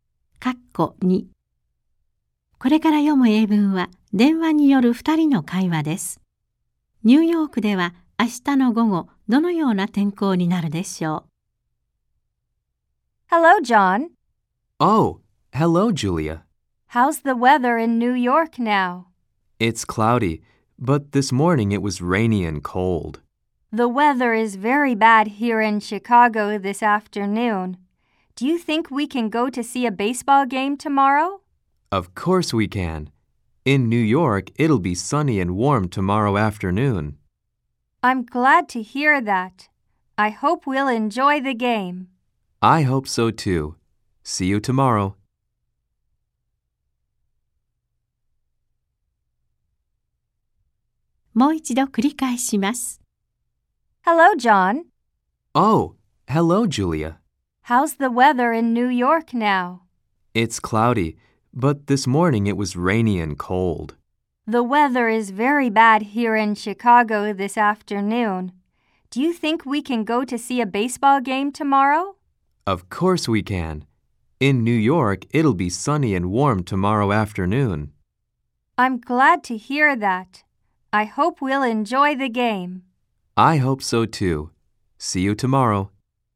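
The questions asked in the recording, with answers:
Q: ニューヨークでは明日の午後、どのような天候になるでしょう?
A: 晴れて暖かい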